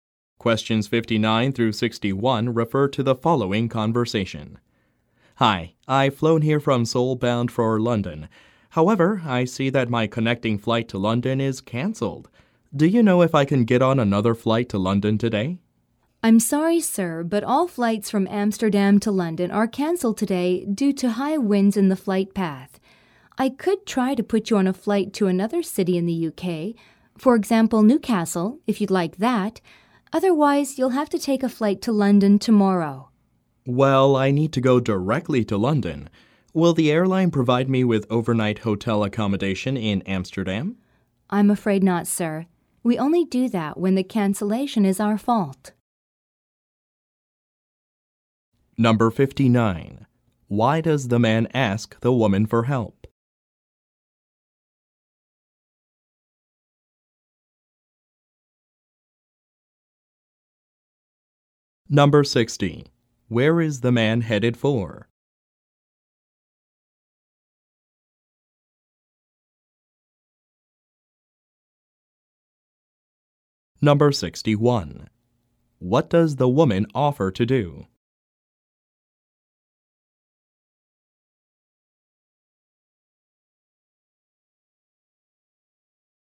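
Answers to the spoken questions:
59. His connecting flight to London was cancelled
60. London
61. Put him on a flight to another UK city, such as Newcastle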